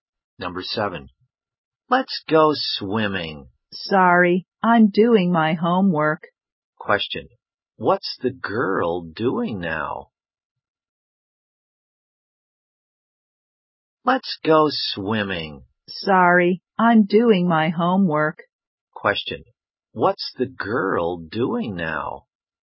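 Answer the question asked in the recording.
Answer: Doing her homework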